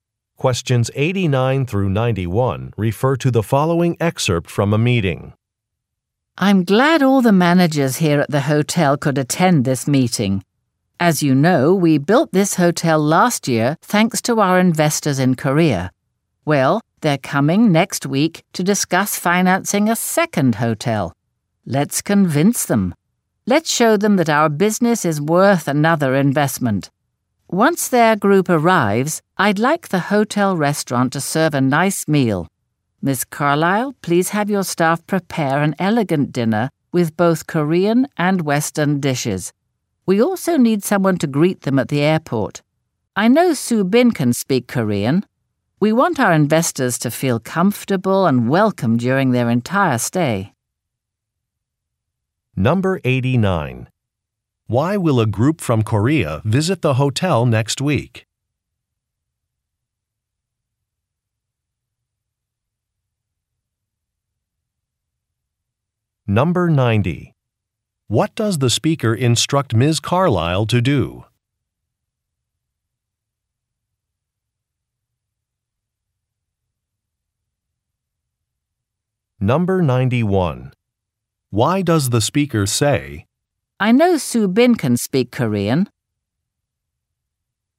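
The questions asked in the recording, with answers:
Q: Why will a group from Korea visit the hotel next week?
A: To discuss financing a second hotel

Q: What does the speaker instruct Ms. Carlyle to do?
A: Have her staff prepare an elegant dinner with Korean and Western dishes

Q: Why does the speaker say, I know Soo Bin can speak Korean.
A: To suggest Soo Bin greet the investors at the airport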